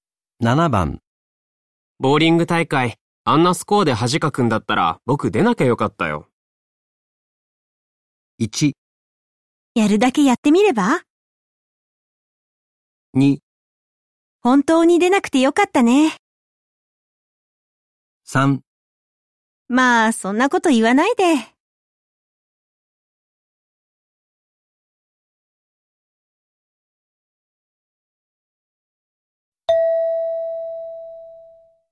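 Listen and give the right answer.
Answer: 3: まあ、そんなこと言わないで。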